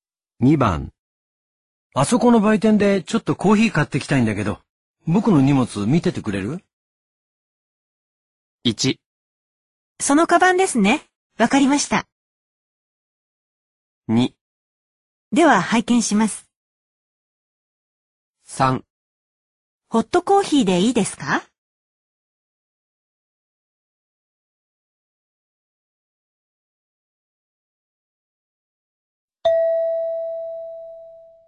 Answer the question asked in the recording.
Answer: 1

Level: N2